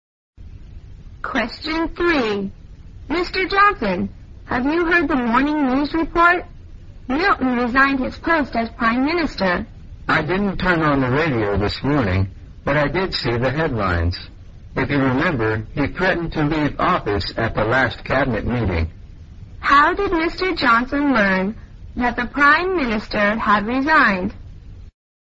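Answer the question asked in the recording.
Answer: From the newspaper headlines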